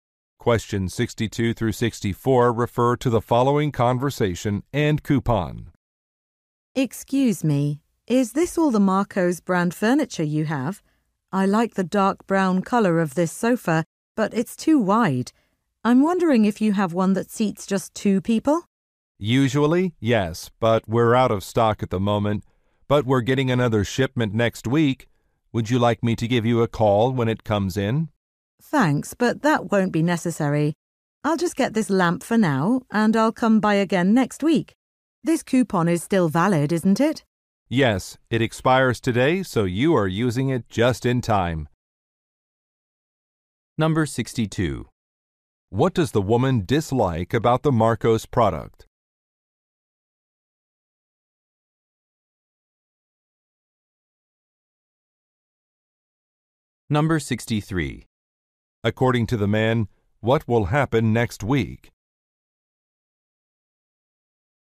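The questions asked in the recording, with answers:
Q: What does the woman dislike about the Marco's product?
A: The sofa is too wide

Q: According to the man, what will happen next week?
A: A new shipment will arrive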